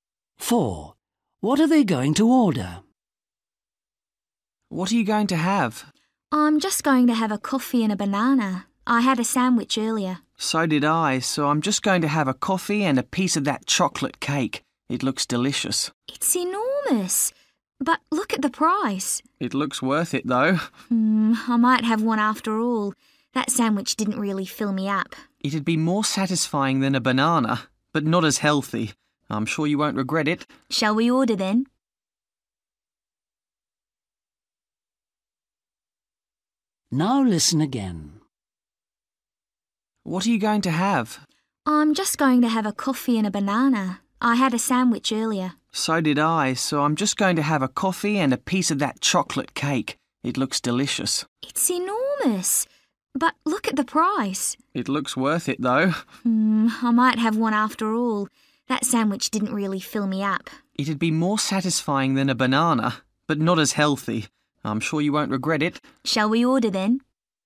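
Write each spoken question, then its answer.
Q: What are they going to order?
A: coffee and chocolate cake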